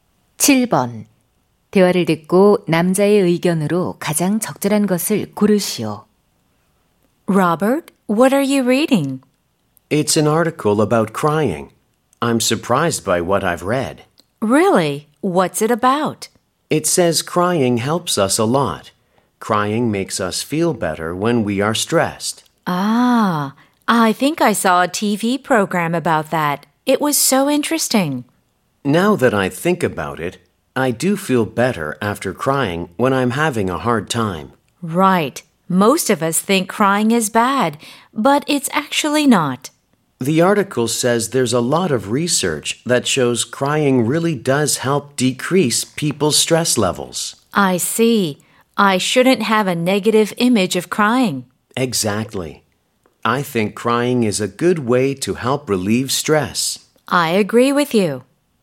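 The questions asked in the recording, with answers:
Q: 대화를 듣고 남자의 의견으로 가장 적절한 것을 고르시오.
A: 우는 것은 스트레스 해소에 도움이 된다.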